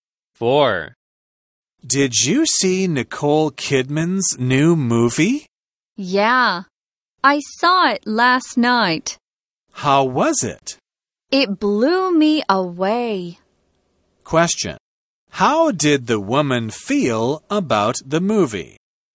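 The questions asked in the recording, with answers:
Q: How did the woman feel about the movie?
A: She was very impressed by it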